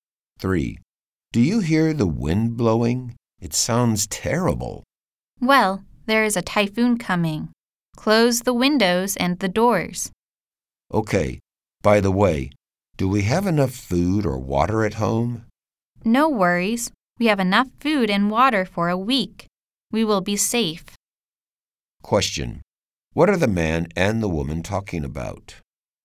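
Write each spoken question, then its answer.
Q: What are the man and the woman talking about?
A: A coming typhoon.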